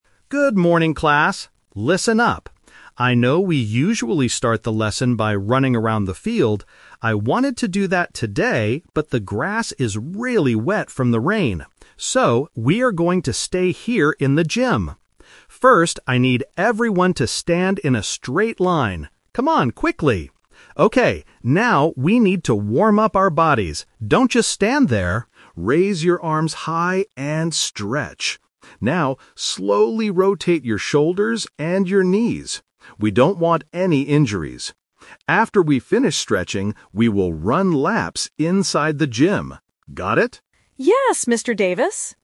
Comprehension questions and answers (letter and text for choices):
Listen to a PE teacher talking to his students. Choose the correct answer (A, B, or C) for each question.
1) What did the teacher originally want to do at the beginning of the class?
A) Stretch inside the gym.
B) Play a sport.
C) Run around the field.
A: C) Run around the field.

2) Why did the teacher change the plan?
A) Because it is too cold outside.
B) Because the grass is wet.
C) Because the students are tired.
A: B) Because the grass is wet.

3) What is the first thing the students must do now?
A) Run inside the gym.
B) Stand in a line and stretch.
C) Sit down and rest.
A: B) Stand in a line and stretch.

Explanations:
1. The teacher says, "I know we usually start the lesson by running around the field. I wanted to do that today...". Option (A) is a trap; stretching inside the gym is the new plan, not the original one. Option (B) is a plausible PE activity but is not mentioned.
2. The teacher clearly explains the reason: "but the grass is really wet from the rain." Option (A) is a trap; weather is often a reason to stay inside, but the audio specifically mentions rain and wet grass, not cold. Option (C) is plausible but not mentioned in the audio.
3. The teacher gives the instruction: "First, I need everyone to stand in a straight line... Raise your arms high and stretch." Option (A) is a trap; running inside the gym is what they will do after stretching. Option (C) is incorrect and not mentioned.

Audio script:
Teacher: Good morning, class! Listen up. I know we usually start the lesson by running around the field. I wanted to do that today, but the grass is really wet from the rain. So, we are going to stay here in the gym. First, I need everyone to stand in a straight line. Come on, quickly! Okay, now, we need to warm up our bodies. Don't just stand there! Raise your arms high and stretch. Now, slowly rotate your shoulders and your knees. We don't want any injuries. After we finish stretching, we will run laps inside the gym. Got it?